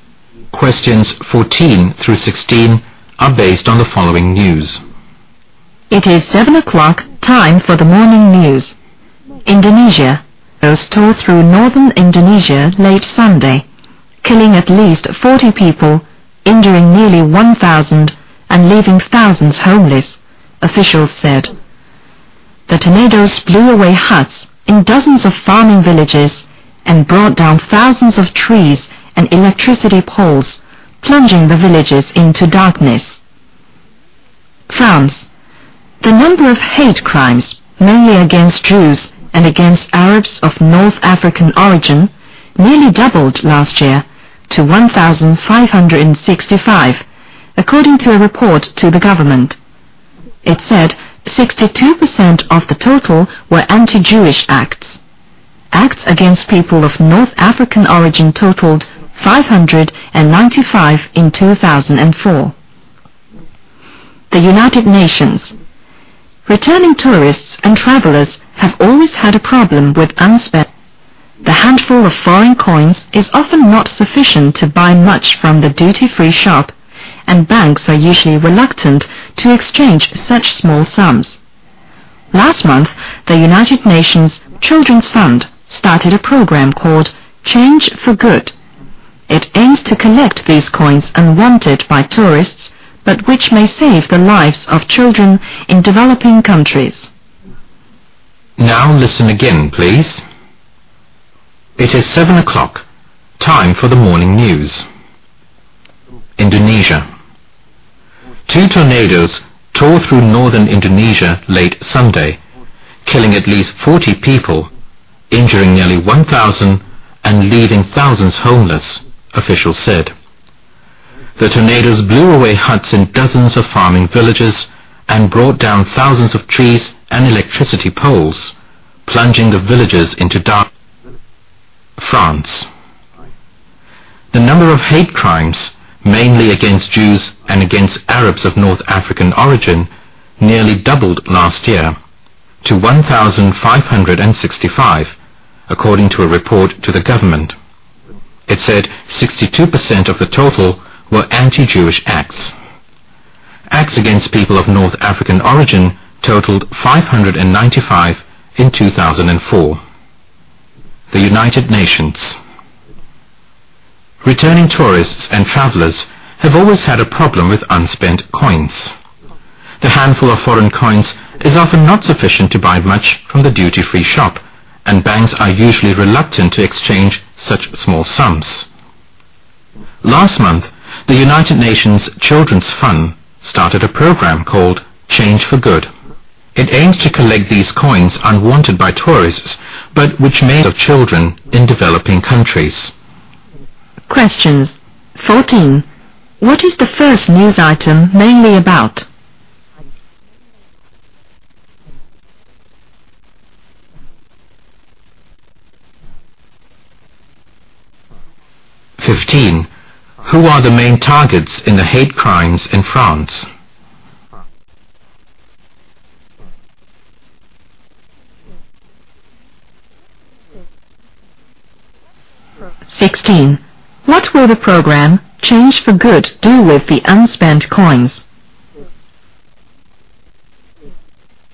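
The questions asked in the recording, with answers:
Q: What is the first news item mainly about?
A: Tornadoes in northern Indonesia

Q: Who are the main targets in the hate crimes in France?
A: Jews and Arabs of North African origin

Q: What will the program Change for Good do with the unspent coins?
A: Use them to help save children in developing countries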